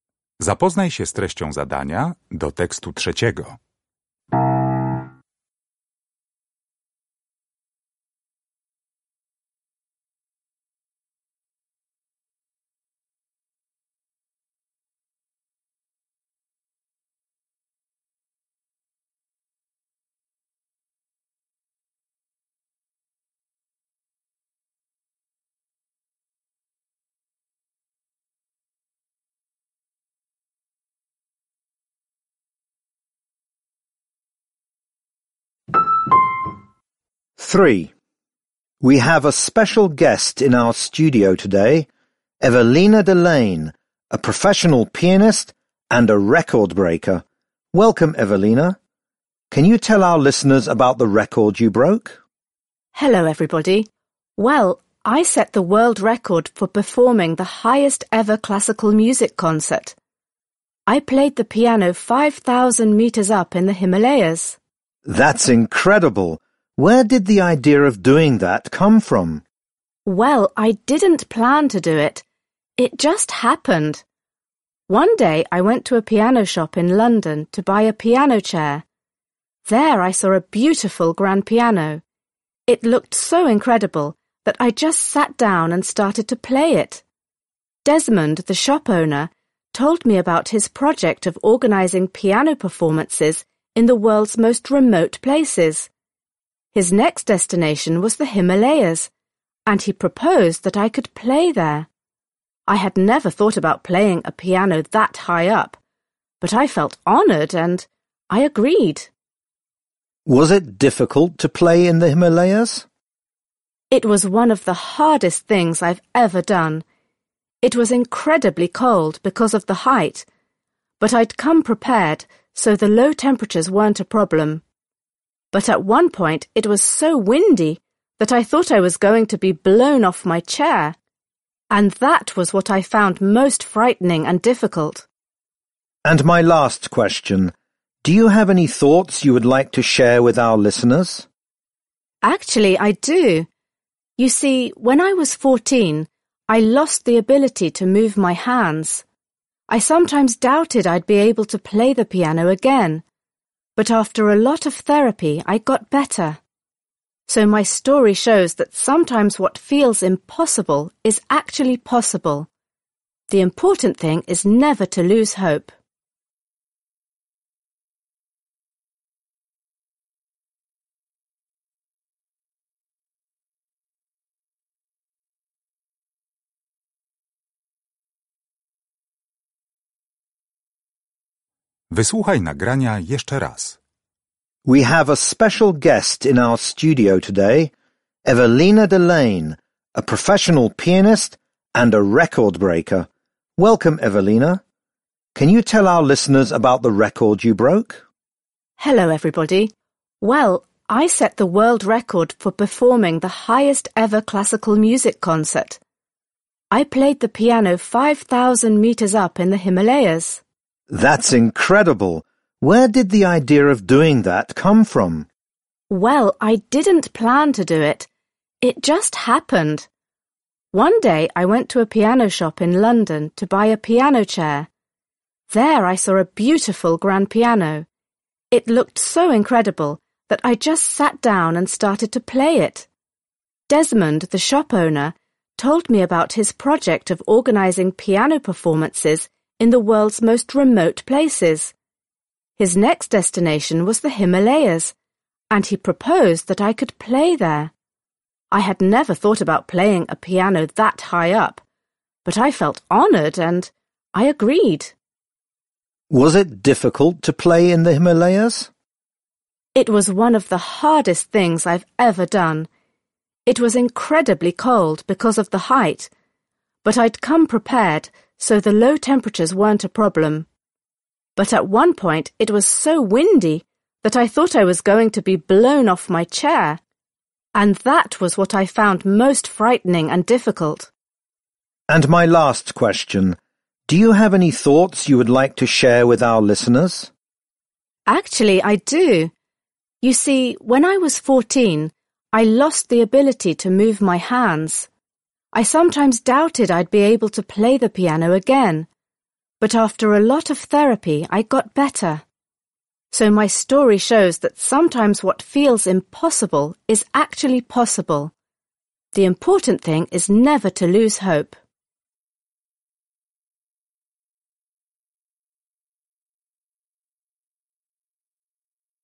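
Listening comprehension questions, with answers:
Uruchamiając odtwarzacz z oryginalnym nagraniem CKE usłyszysz dwukrotnie trzy teksty. Z podanych odpowiedzi wybierz właściwą, zgodną z treścią nagrania.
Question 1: Evelina decided to play a piano concert in the Himalayas because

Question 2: What turned out to be the greatest challenge for Evelina during the concert?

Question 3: When answering the last question, Evelina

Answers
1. the owner of a piano shop suggested it to her
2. the strong wind
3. encourages listeners never to lose hope

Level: poziom podstawowy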